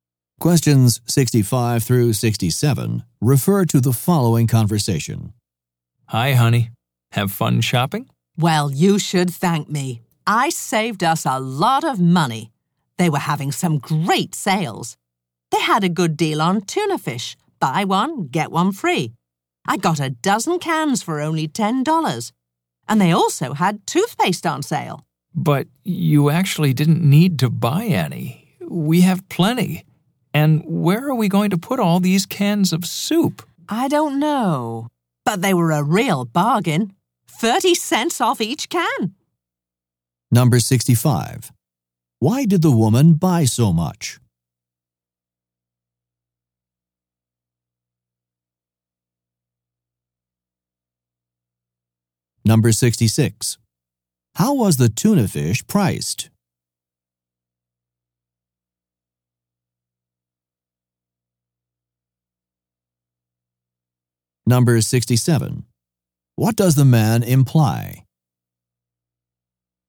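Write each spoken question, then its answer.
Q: Why did the woman buy so much?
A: The items were on sale

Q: How was the tuna fish priced?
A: Buy one, get one free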